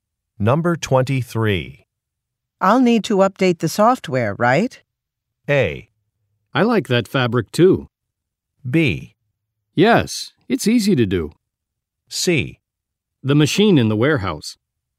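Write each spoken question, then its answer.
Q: I'll need to update the software, right?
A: B: Yes, it's easy to do.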